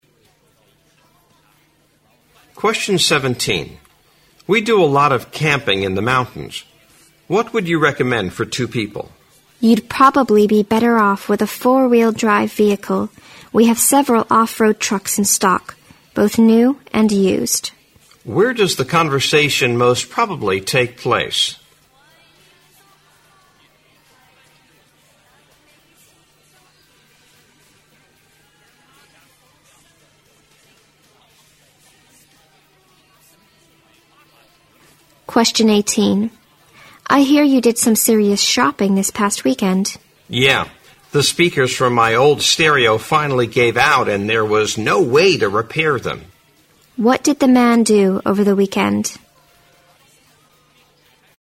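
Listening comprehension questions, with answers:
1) What did the man do over the weekend?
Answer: He bought a stereo system.

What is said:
M: We do a lot of camping in the mountains. What would you recommend for two people?
W: You'd probably be better off with the four-wheel drive vehicle. We have several off-road trucks in stock, both new and used.
Q: Where does the conversation most probably take place?
W: I hear you did some serious shopping this past weekend.
M: Yeah, the speakers of my old stereo finally gave out and there was no way to repair them.
Q: What did the man do over the weekend?

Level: 六级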